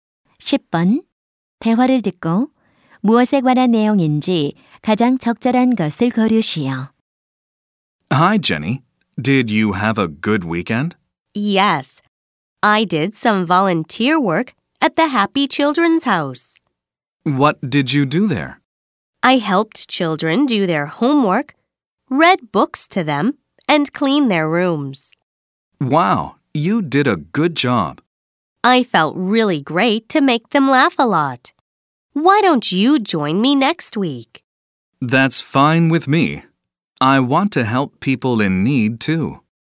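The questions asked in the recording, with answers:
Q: 대화를 듣고 무엇에 관한 내용인지 가장 적절한 것을 고르시오.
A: 봉사 활동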